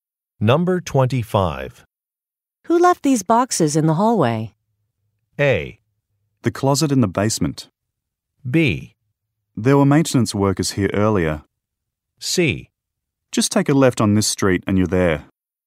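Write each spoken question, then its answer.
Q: Who left these boxes in the hallway?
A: B: There were maintenance workers here earlier.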